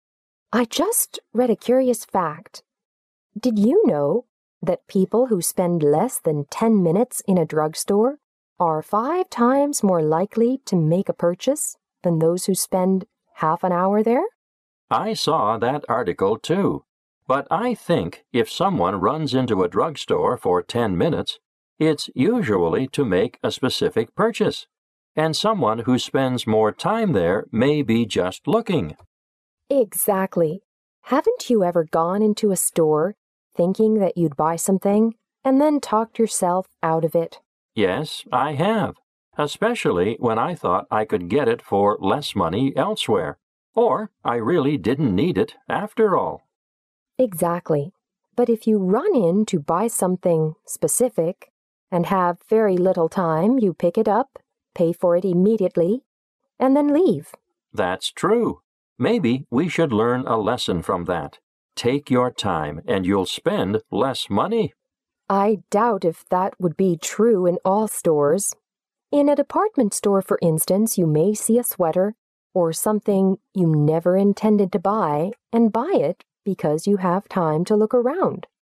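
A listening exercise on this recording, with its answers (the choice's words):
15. What caused the conversation?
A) A druggist's suggestion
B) A sales clerk's comment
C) An advertisement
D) An article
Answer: An article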